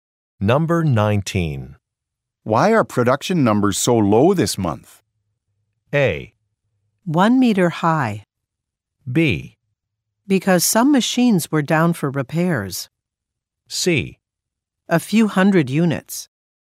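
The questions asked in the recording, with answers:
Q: Why are production numbers so low this month?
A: B: Because some machines were down for repairs.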